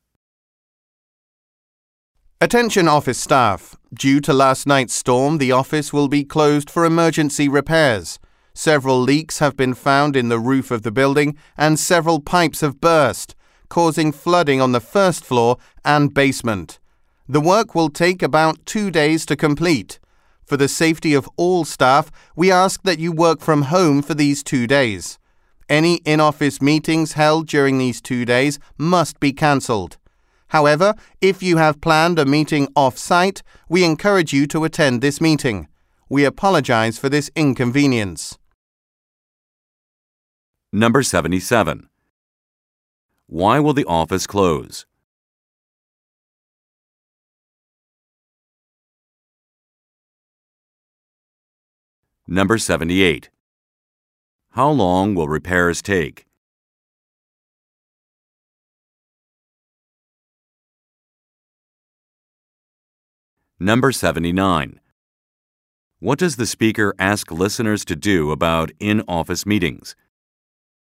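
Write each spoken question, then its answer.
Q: Why will the office close?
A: For emergency repairs after last night's storm caused leaks and flooding

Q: How long will repairs take?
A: About 2 days

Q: What does the speaker ask listeners to do about in-office meetings?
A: Cancel them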